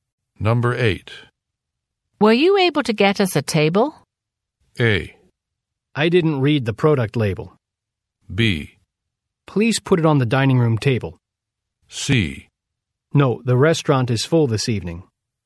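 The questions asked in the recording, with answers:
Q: Were you able to get us a table?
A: C: No, the restaurant is full this evening.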